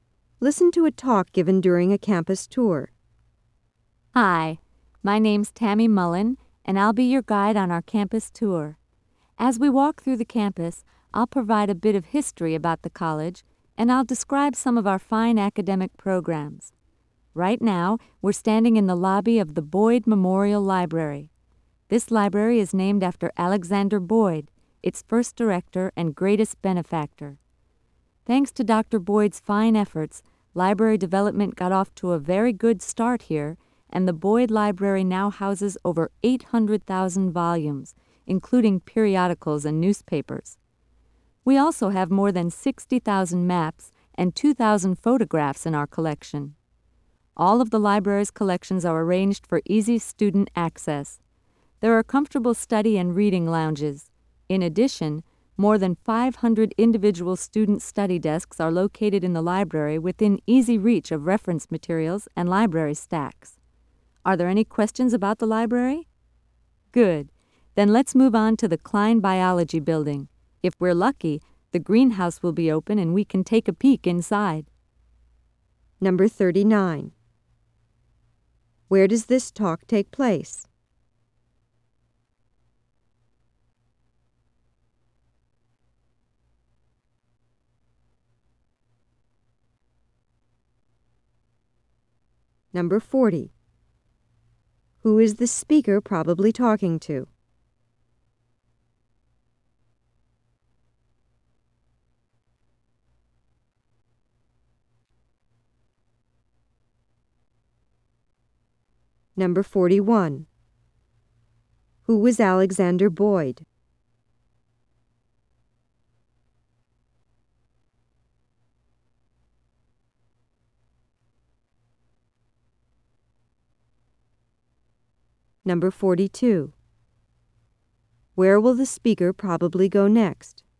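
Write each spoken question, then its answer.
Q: Where does this talk take place?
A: In the lobby of the Boyd Memorial Library

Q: Who is the speaker probably talking to?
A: Visitors on a campus tour (prospective students)

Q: Who was Alexander Boyd?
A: The library's first director and greatest benefactor

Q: Where will the speaker probably go next?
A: To the Klein Biology Building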